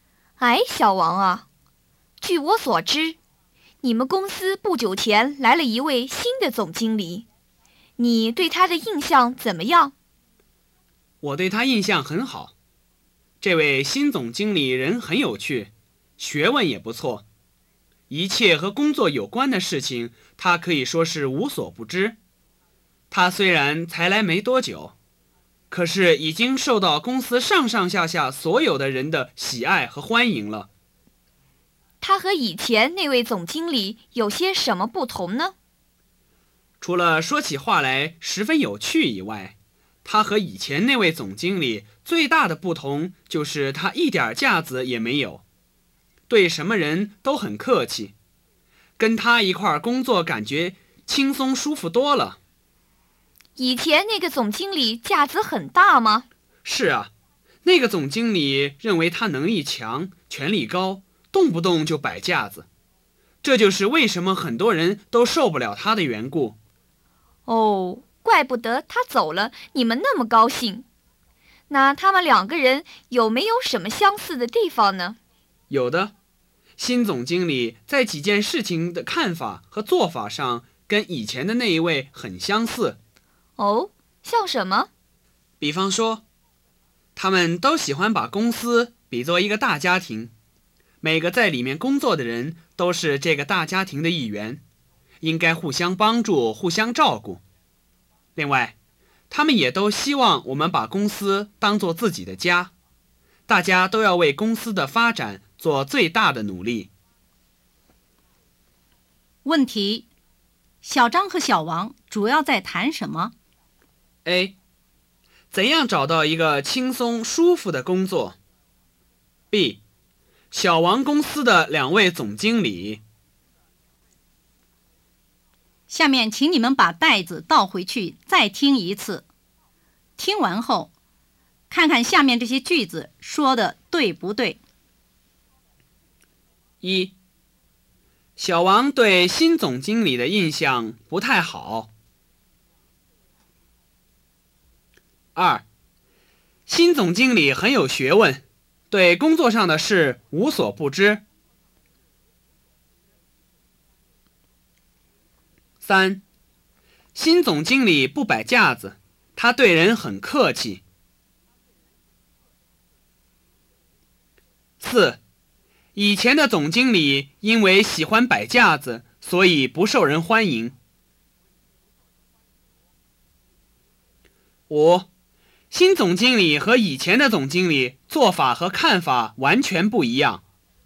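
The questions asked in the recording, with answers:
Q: 问题,小张和小王主要在谈什么?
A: B: 小王公司的两位总经理。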